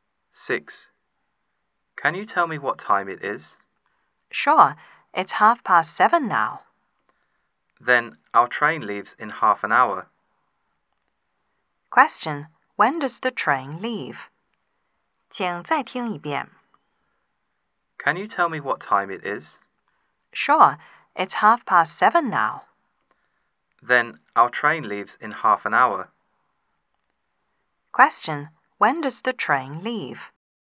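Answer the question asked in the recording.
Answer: At 8:00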